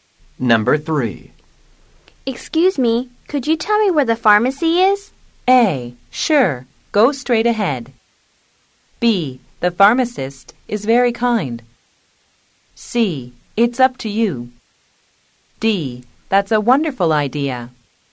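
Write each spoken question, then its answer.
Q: Excuse me, could you tell me where the pharmacy is?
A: A: Sure, go straight ahead.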